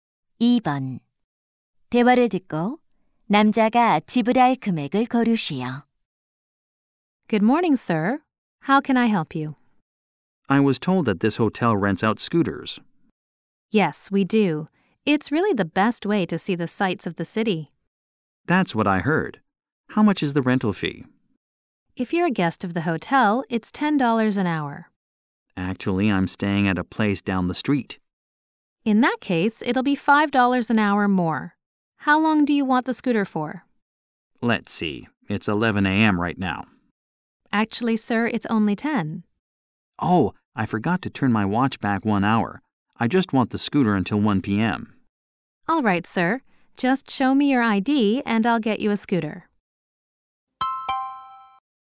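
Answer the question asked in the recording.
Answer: $45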